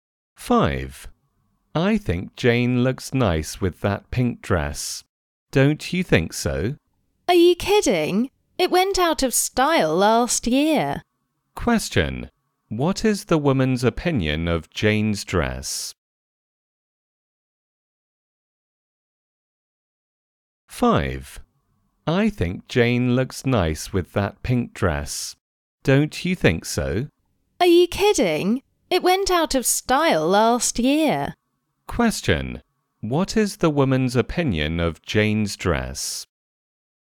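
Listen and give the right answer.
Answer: It's out of style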